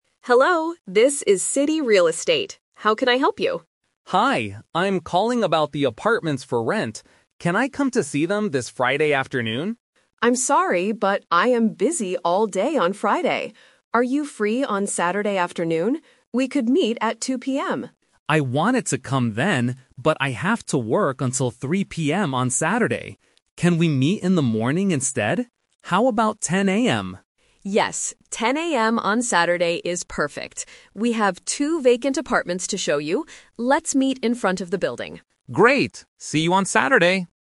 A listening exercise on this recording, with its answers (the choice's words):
Listen to the conversation and choose the correct answer (A, B, or C).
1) When will they meet to look at the apartments?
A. Friday afternoon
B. Saturday at 10:00 AM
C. Saturday at 2:00 PM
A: Saturday at 10:00 AM

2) Why can't the renter meet at 2:00 PM on Saturday?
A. He has to go to work.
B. He is meeting a friend.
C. He is moving to a new house.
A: He has to go to work.

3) Where will they meet?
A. At the real estate office.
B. Inside the apartment.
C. In front of the building.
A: In front of the building.

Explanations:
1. They finally agree to meet on Saturday at 10:00 AM. Option (A) is a trap because Friday afternoon is the renter's first idea, but the agent is busy. Option (C) is a trap because 2:00 PM is the agent's suggestion, but the renter is busy.
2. The renter says, "I have to work until 3:00 PM on Saturday." Option (B) and Option (C) are plausible reasons for someone to be busy, but they are not mentioned in the audio.
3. The agent says, "Let's meet in front of the building." Option (A) is a plausible place to meet a real estate agent, but it is not mentioned. Option (B) is a trap because they will go inside to look at the apartments after they meet outside.

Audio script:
Agent: Hello, this is City Real Estate. How can I help you?
Renter: Hi, I'm calling about the apartments for rent. Can I come to see them this Friday afternoon?
Agent: I'm sorry, but I am busy all day on Friday. Are you free on Saturday afternoon?
Renter: I wanted to come then, but I have to work until 3:00 PM on Saturday. Can we meet in the morning instead?
Agent: Yes, 10:00 AM on Saturday is perfect. We have two vacant apartments to show you. Let's meet in front of the building.

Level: A2